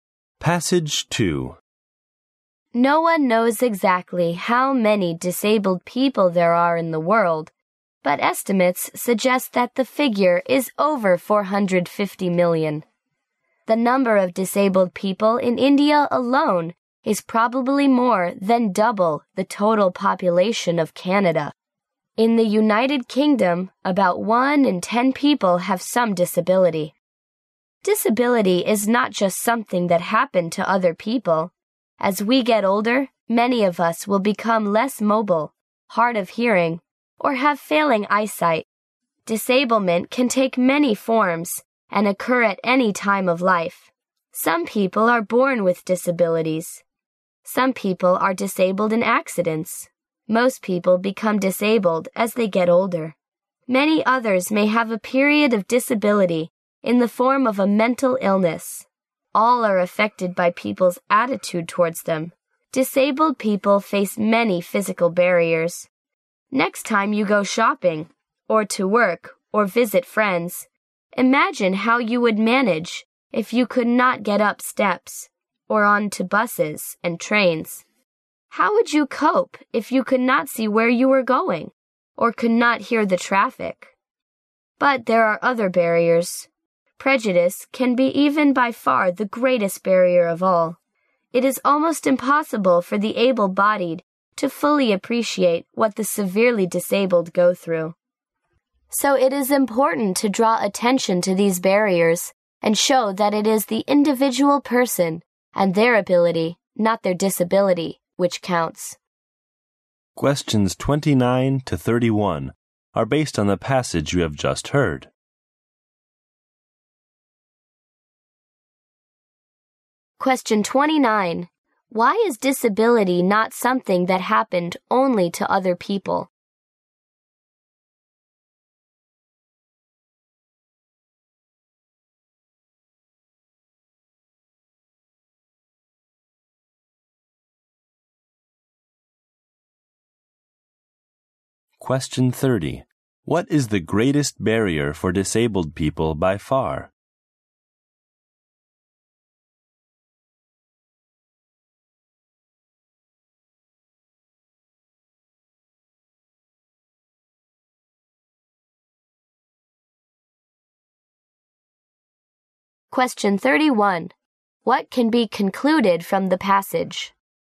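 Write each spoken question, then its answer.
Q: Why is disability not something that happened only to other people?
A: Many of us will become disabled as we get older.

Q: What is the greatest barrier for disabled people by far?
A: Prejudice.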